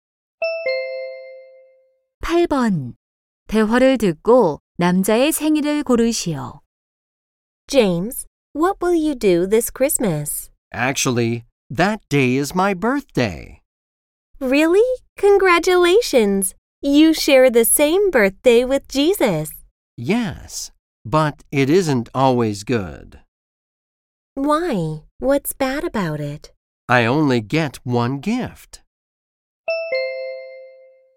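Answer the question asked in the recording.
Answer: 12월 25일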